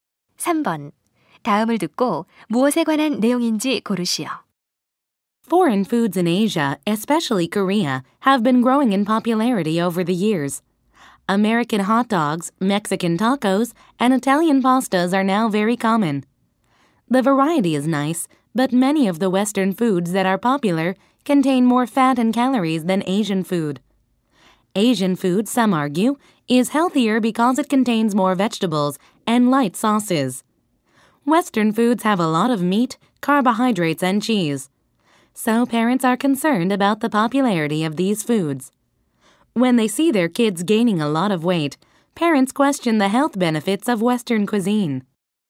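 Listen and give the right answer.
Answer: 서양 음식의 인기와 건강 문제에 대한 우려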